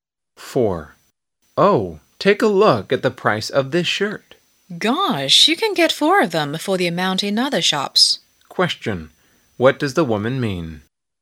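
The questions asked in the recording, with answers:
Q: What does the woman mean?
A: The shirt is far too expensive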